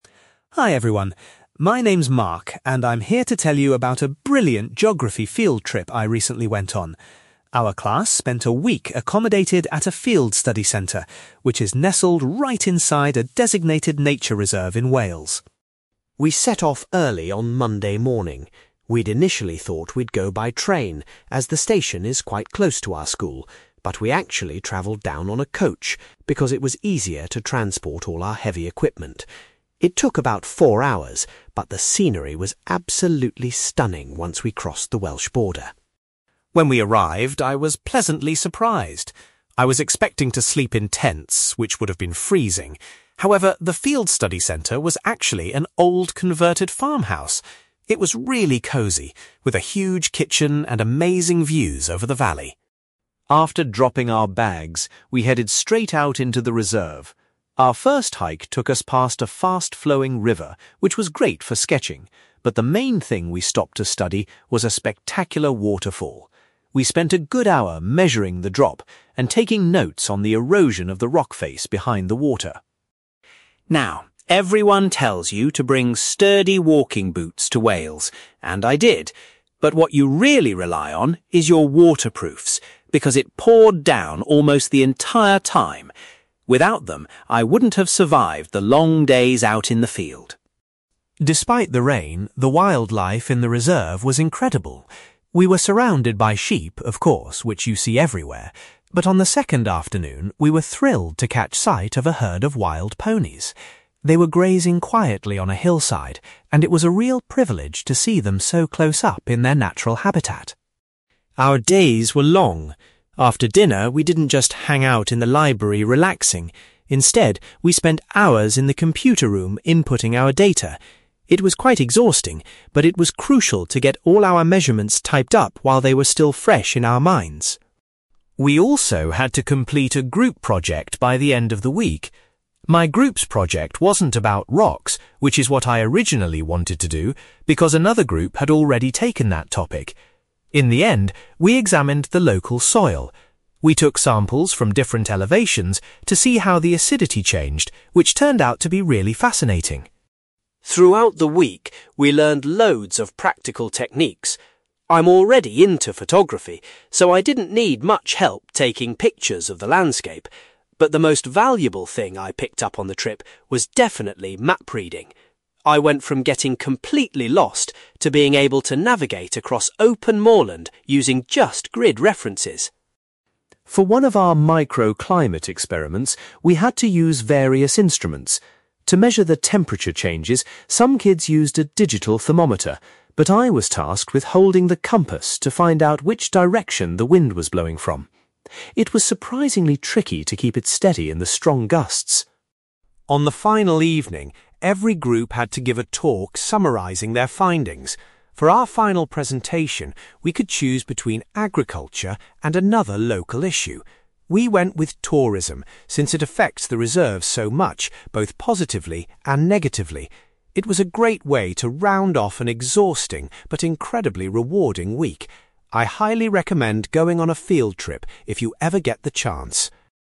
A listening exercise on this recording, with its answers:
You will hear a geography student called Mark giving a presentation about a recent field trip to a nature reserve in Wales. For questions 9-18, complete the sentences with a word or short phrase.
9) Mark's group journeyed to the Welsh nature reserve by (9)........................... .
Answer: coach

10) Mark was relieved that the students stayed in a (10)........................... rather than at a campsite.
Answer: farmhouse

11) The students investigated a (11)........................... during their first walk in the reserve.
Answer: waterfall

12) Mark says that having good (12)........................... was essential due to the wet weather.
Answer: waterproofs

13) Mark was particularly excited to see some (13)........................... while exploring the area.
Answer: wild ponies

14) Each evening, the students gathered in the centre's (14)........................... to record their findings.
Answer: computer room

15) Mark's group ultimately chose to investigate the (15)........................... for their main research task.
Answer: soil

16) Mark believes that (16)........................... was the most useful new skill he developed during the trip.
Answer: map reading

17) Mark was given a (17)........................... to help determine the wind direction.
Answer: compass

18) Mark's group delivered their final presentation on the subject of (18)........................... .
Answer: tourism

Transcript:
Mark: Hi everyone. My name's Mark, and I'm here to tell you about a brilliant geography field trip I recently went on. Our class spent a week accommodated at a field study centre, which is nestled right inside a designated nature reserve in Wales.
We set off early on Monday morning. We'd initially thought we'd go by train, as the station is quite close to our school, but we actually travelled down on a coach because it was easier to transport all our heavy equipment. It took about four hours, but the scenery was absolutely stunning once we crossed the Welsh border.
When we arrived, I was pleasantly surprised. I was expecting to sleep in tents, which would have been freezing, however, the field study centre was actually an old converted farmhouse. It was really cosy, with a huge kitchen and amazing views over the valley.
After dropping our bags, we headed straight out into the reserve. Our first hike took us past a fast-flowing river, which was great for sketching, but the main thing we stopped to study was a spectacular waterfall. We spent a good hour measuring the drop and taking notes on the erosion of the rock face behind the water.
Now, everyone tells you to bring sturdy walking boots to Wales, and I did, but what you really rely on is your waterproofs, because it poured down almost the entire time! Without them, I wouldn't have survived the long days out in the field.
Despite the rain, the wildlife in the reserve was incredible. We were surrounded by sheep, of course, which you see everywhere, but on the second afternoon we were thrilled to catch sight of a herd of wild ponies. They were grazing quietly on a hillside, and it was a real privilege to see them so close up in their natural habitat.
Our days were long. After dinner, we didn't just hang out in the library relaxing. Instead, we spent hours in the computer room inputting our data. It was quite exhausting, but it was crucial to get all our measurements typed up while they were still fresh in our minds.
We also had to complete a group project by the end of the week. My group's project wasn't about rocks, which is what I originally wanted to do, because another group had already taken that topic. In the end, we examined the local soil. We took samples from different elevations to see how the acidity changed, which turned out to be really fascinating.
Throughout the week, we learned loads of practical techniques. I'm already into photography, so I didn't need much help taking pictures of the landscape, but the most valuable thing I picked up on the trip was definitely map reading. I went from getting completely lost to being able to navigate across open moorland using just grid references!
For one of our microclimate experiments, we had to use various instruments. To measure the temperature changes, some kids used a digital thermometer, but I was tasked with holding the compass to find out which direction the wind was blowing from. It was surprisingly tricky to keep it steady in the strong gusts!
On the final evening, every group had to give a talk summarizing their findings. For our final presentation, we could choose between agriculture and another local issue. We went with tourism since it affects the reserve so much, both positively and negatively. It was a great way to round off an exhausting but incredibly rewarding week. I highly recommend going on a field trip if you ever get the chance!

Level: B2